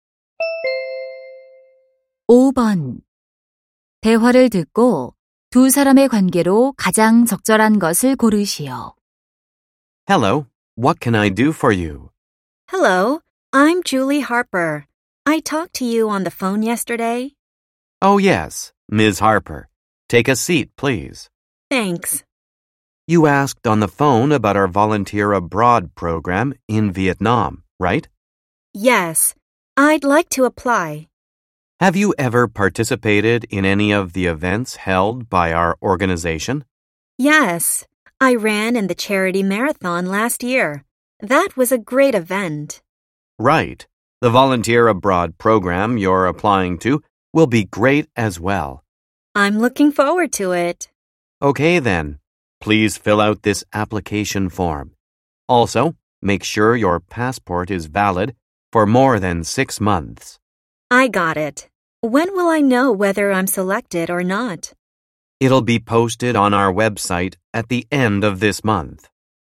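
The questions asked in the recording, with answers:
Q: 대화를 듣고 두 사람의 관계로 가장 적절한 것을 고르시오.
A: 해외 봉사 프로그램 지원자와 단체 직원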